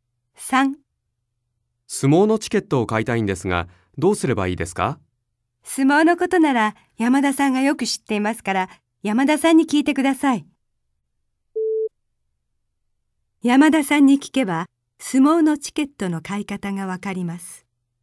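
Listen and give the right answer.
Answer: ○(正しい)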